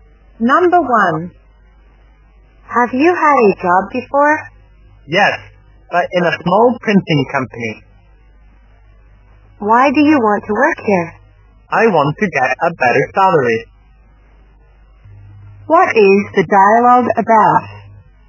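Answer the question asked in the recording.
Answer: A job interview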